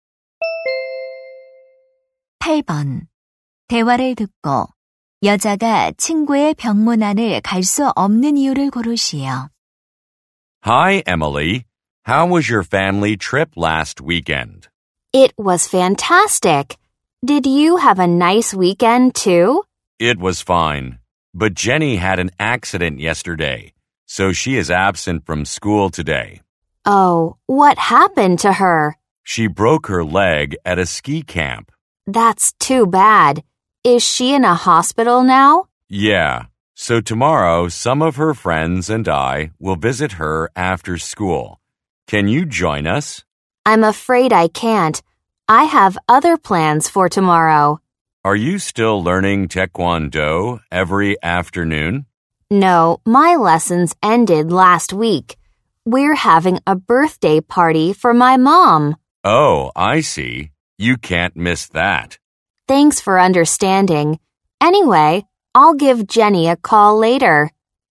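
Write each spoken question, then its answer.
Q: 대화를 듣고 여자가 친구의 병문 안을 갈 수 없는 이유를 고르시오.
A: 엄마의 생일 파티 때문에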